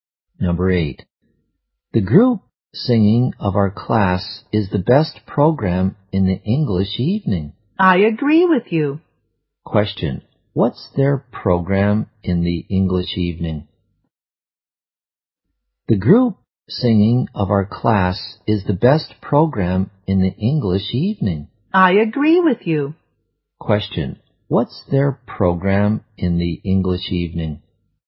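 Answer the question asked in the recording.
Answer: Group singing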